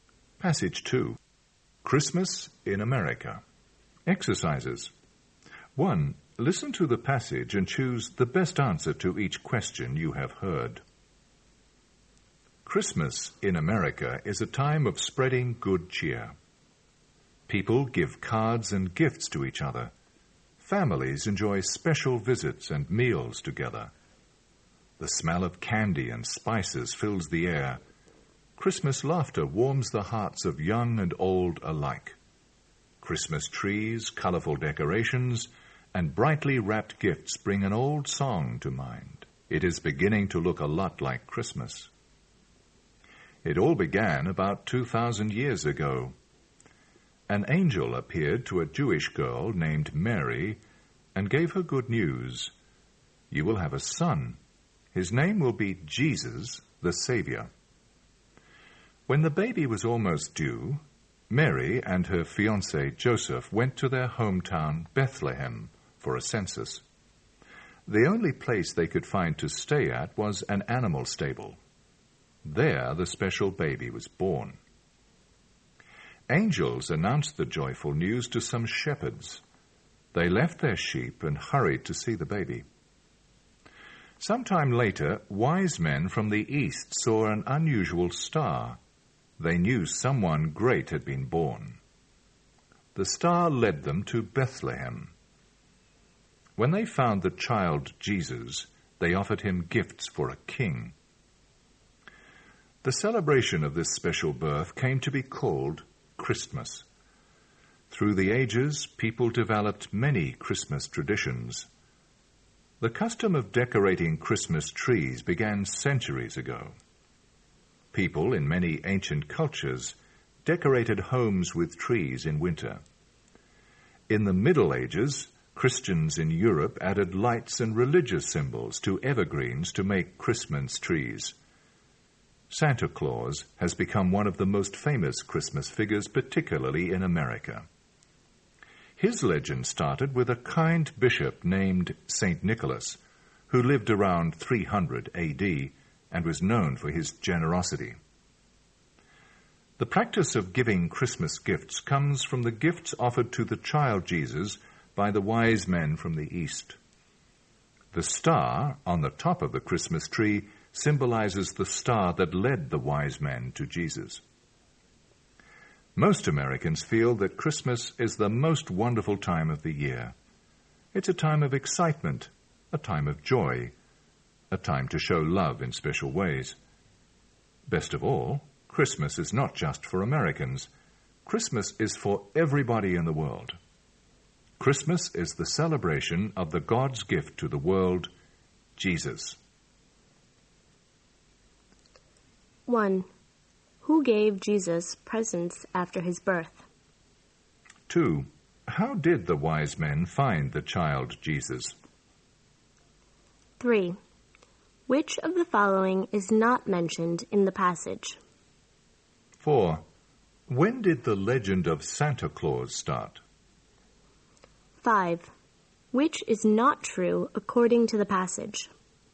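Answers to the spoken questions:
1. Wise men from the east
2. A star led them to Bethlehem
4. Around 300 AD, with St. Nicholas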